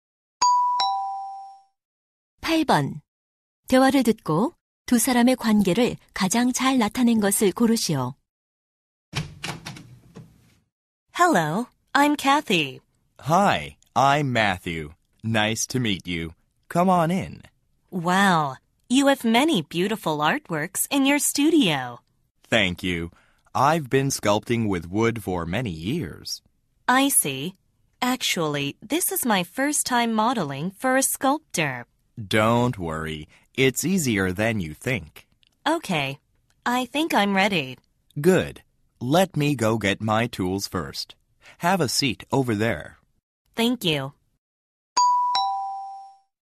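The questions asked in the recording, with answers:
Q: 대화를 듣고 두 사람의 관계를 가장 잘 나타낸 것을 고르시오.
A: 조각가와 모델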